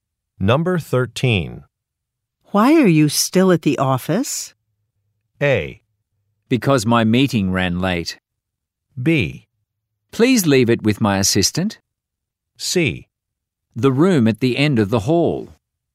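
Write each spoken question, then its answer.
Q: Why are you still at the office?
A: A: Because my meeting ran late.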